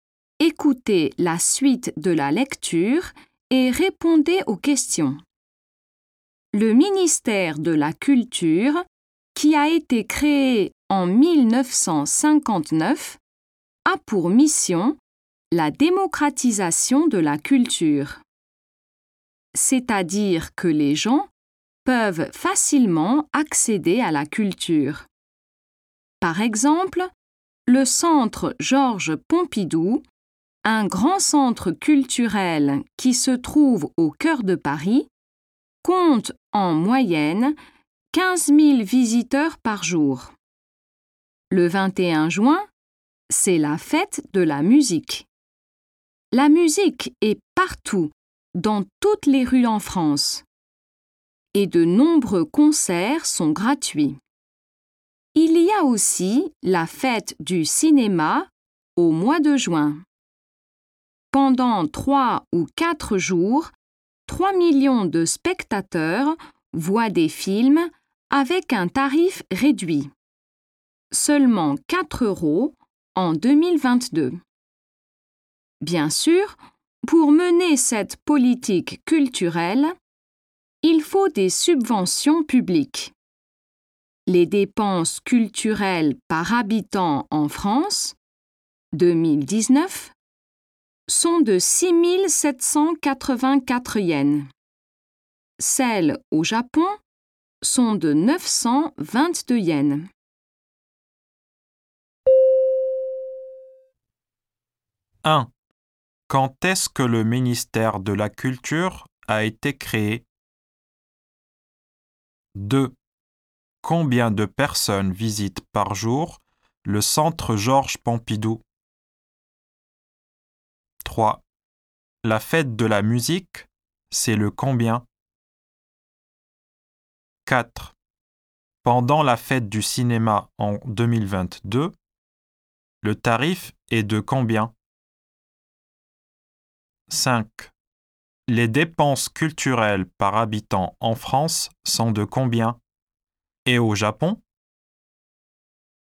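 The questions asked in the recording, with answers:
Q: Quand est-ce que le ministère de la Culture a été créé?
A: En 1959

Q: Combien de personnes visitent par jour le centre Georges Pompidou?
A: 15 000 visiteurs en moyenne

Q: La fête de la musique, c'est le combien?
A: Le 21 juin

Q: Pendant la fête du cinéma en 2022, le tarif est de combien?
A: 4 euros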